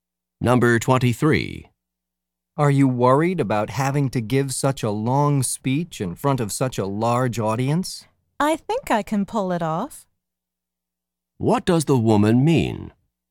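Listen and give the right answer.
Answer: She thinks she can give the speech successfully.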